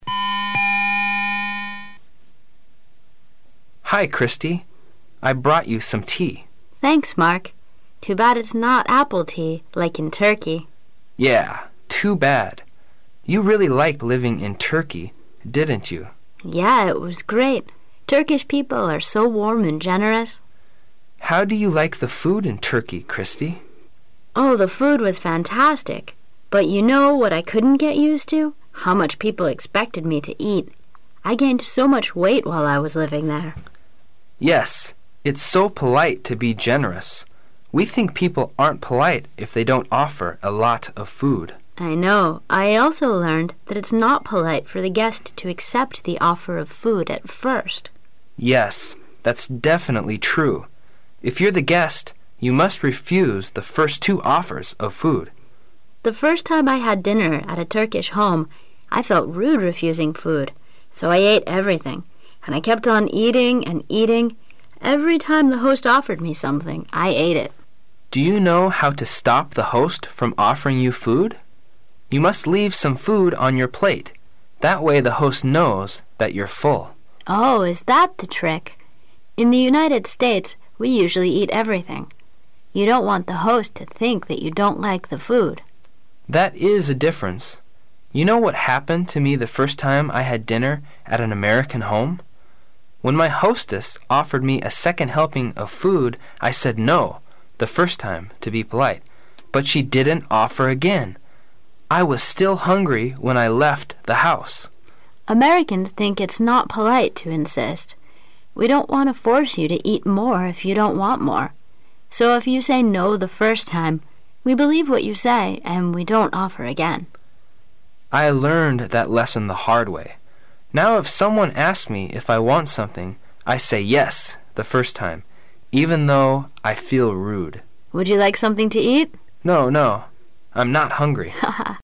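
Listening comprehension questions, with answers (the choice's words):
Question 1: Where are each of the two speakers from possibly?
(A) The man is from the United States and the woman is from Turkey.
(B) The man is from Turkey and the woman is from the United States.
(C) Both are from the United States.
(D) Both are from Turkey.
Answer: The man is from Turkey and the woman is from the United States.

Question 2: What was the trouble for the woman when she was in Turkey?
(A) The Turkish people did tricks on her.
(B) She didn' t know how to ask for more food.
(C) She ate too much and became fatter.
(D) She liked the Turkish tea and drank too much.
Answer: She ate too much and became fatter.

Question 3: According to the man,how do you stop the host from offering you food?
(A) You have to refuse the offer stubbornly.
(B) You must throw the food out of the window.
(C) You tell them you don' t like the food very much.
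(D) You must leave some food on your plate.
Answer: You must leave some food on your plate.

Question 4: Which of the following statements about the Americans customs is true?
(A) Offering the guest again and again is not polite.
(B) They' d like to offer you once more after your first refusal.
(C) They believe whatever the guest tells them.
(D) Sometimes they are rather hypocritical.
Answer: They believe whatever the guest tells them.

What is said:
A
[解析] 14-17 M: Hi, Christi, I brought you some tea. W: Thanks,Mark. Too bad it' s not apple tea,like in Turkey. M: Yeah,too bad! You really liked living in Turkey,didn't you? W: Yeah, it was great. Turkish people are so warm and generous. M: How do you like the food in Turkey,Christi? W: Oh,the food was fantastic ! But you know what I couldn't get used to? How much people expected me to eat, I gained so much weight while I was living there! 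M: Yes,it' s so polite to be generous. We think people aren' t polite if they don' t offer a lot of food. W: I know. I also learned that it' s not polite for the guest to accept the offer of food at first. M: Yes,that' s definitely tree! If you' re the guest, you must refuse the first two offers of food. W: The first time I had dinner at a Turkish home,I felt rode refusing food. So I ate everything. And I kept on eating.., and eating. Every time the host offered me something, I ate it. M: Do you know how to stop the host from offering you food? That way the host knows that yon' re full. W: Oh,is that the trick? In the United States, we usually eat everything. You don' t want the host to think that you don' t like the food. M: That is a difference. You know what happened to me the first time I had dinner at an American home? When my hostess offered me a second helping of food, I said" no" the first time, to be polite. 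But she didn't offer again! I was still hungry when I left the house! W: Americans think it' s not polite to insist. We don' t want to force you to eat more if you don' t want more. So if you say" no" the first time, we believe what you say and we don' t offer again. M: I learned that lesson the hard way. Now if someone asks me if I want something, I say "yes" the frost time -- even though I feel rude.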